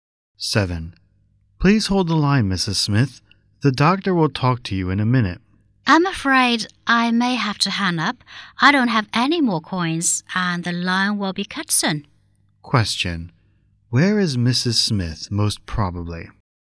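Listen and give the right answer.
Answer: At a public phone box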